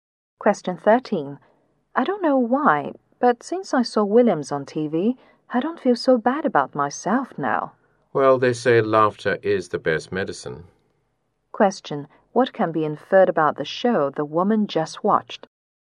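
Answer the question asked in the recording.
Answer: It was a funny show that cheered her up.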